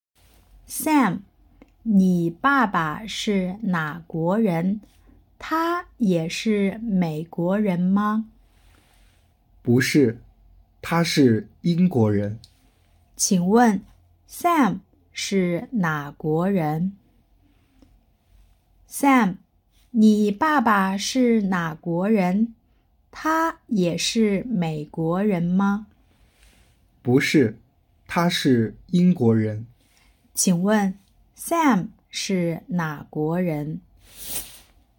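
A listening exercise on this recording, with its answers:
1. Sam是哪国人?- Sam shì nǎ guórén?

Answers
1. 美国人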